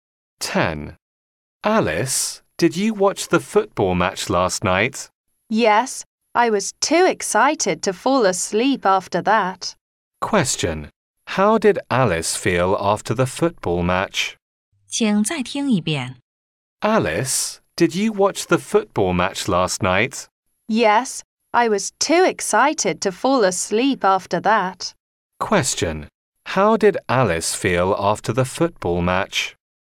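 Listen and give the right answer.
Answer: Too excited to fall asleep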